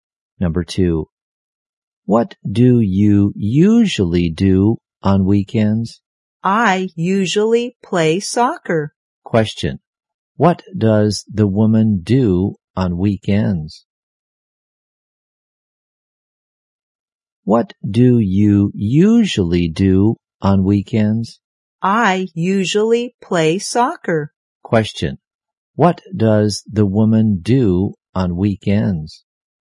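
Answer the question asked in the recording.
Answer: She usually plays soccer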